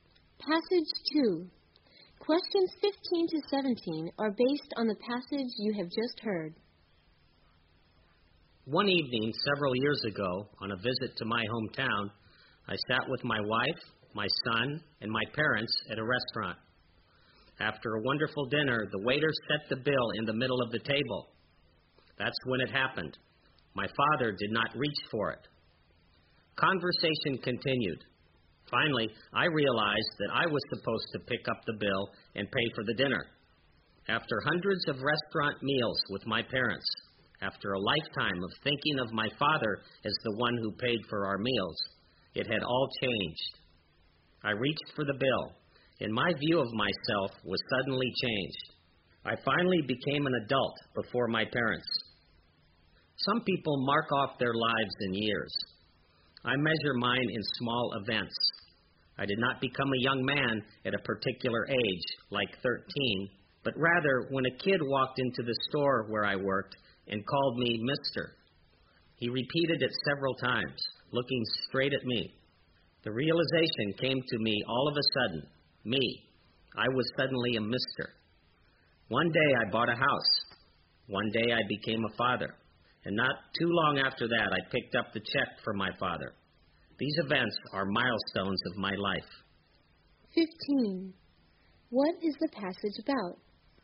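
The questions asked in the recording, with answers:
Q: What is the passage about?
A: Small events that mark milestones in his life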